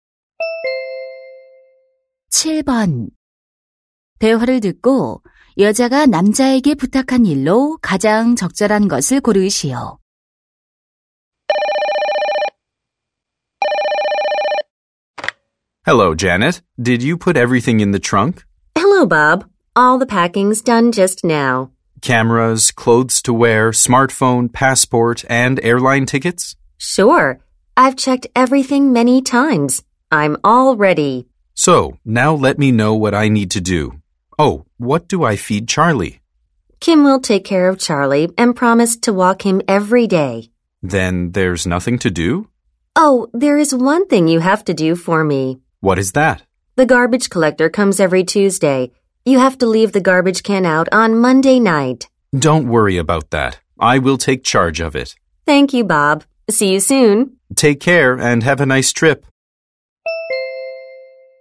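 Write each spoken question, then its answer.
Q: 대화를 듣고 여자가 남자에게 부탁한 일로 가장 적절한 것을 고르시오.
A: 월요일 밤에 쓰레기통 내놓기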